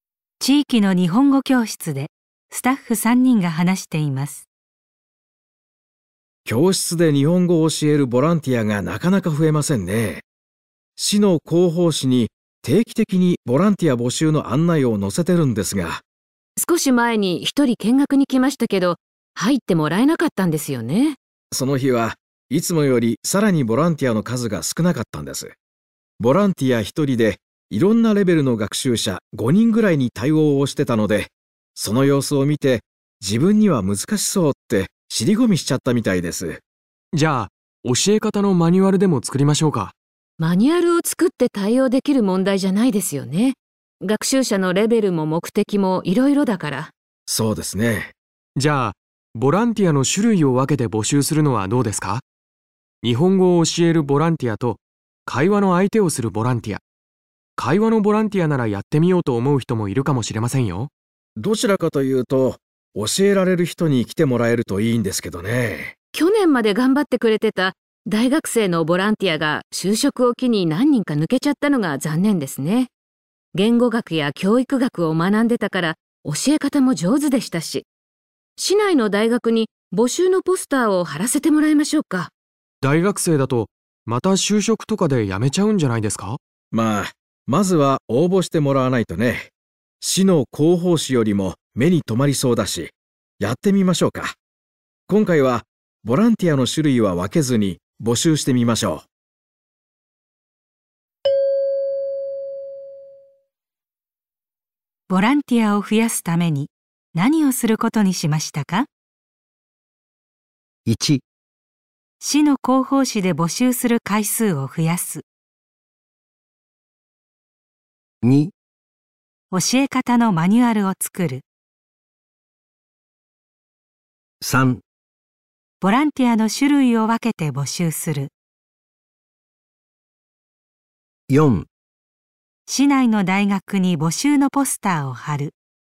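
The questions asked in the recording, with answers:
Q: ボランティアを増やすために何をすることにしましたか。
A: 4: 市内の大学に募集のポスターを貼る。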